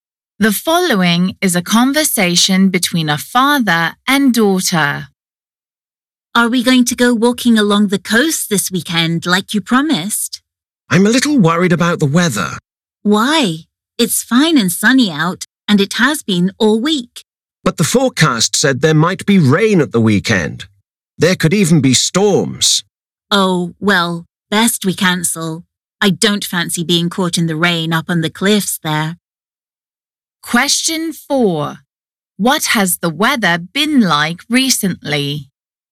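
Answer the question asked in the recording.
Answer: fine and sunny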